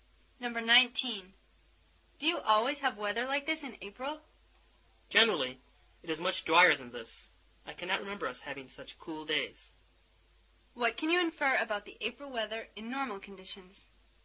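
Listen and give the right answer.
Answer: It is usually drier and warmer.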